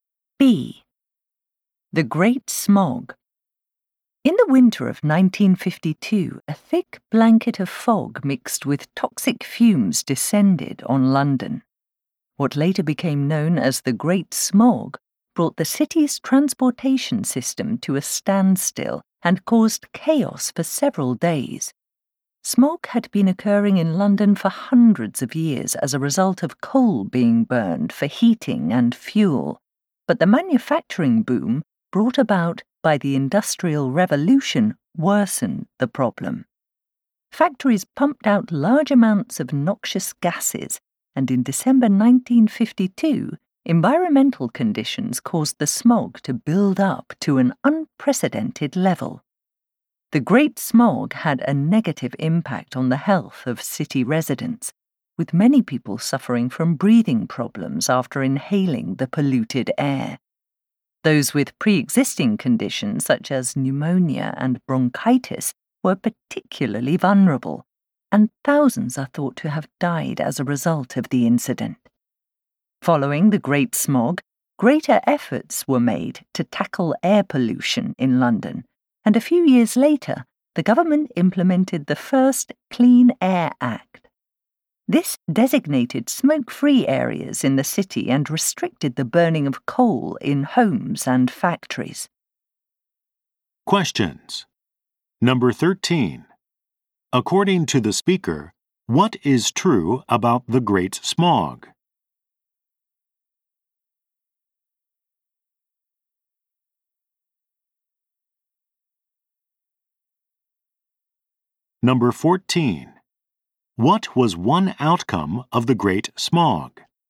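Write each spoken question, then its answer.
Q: According to the speaker, what is true about the Great Smog?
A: Industrial factory gases worsened it, and environmental conditions built it to an unprecedented level

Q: What was one outcome of the Great Smog?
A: The government passed the first Clean Air Act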